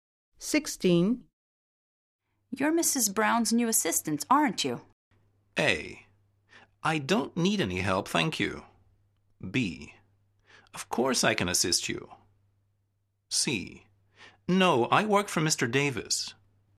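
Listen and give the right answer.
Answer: C: No, I work for Mr. Davis.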